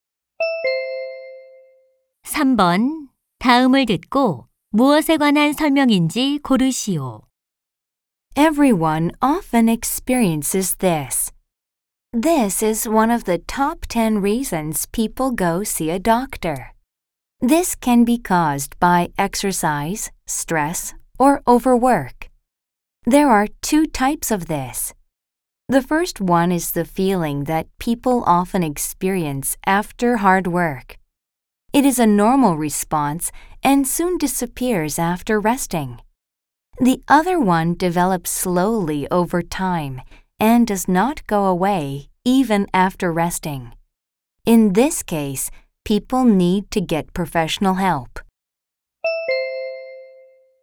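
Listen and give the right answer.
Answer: 피로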